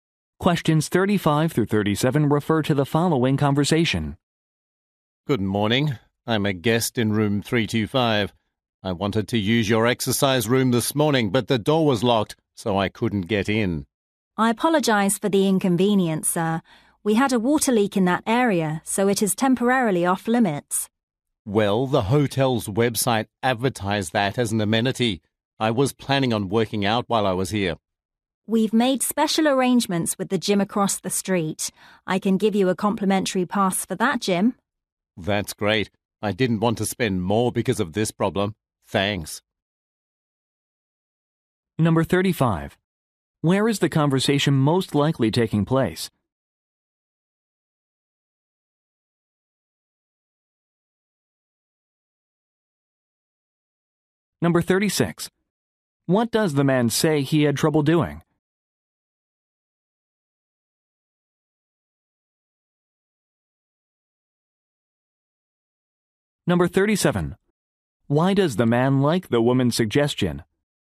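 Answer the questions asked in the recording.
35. At a hotel
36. Getting into the exercise room
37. It costs him nothing extra (a free gym pass)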